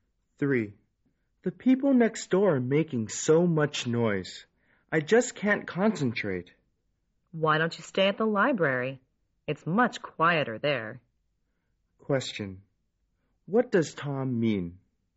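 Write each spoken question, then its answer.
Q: What does Tom mean?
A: The woman should study at the library, where it is quieter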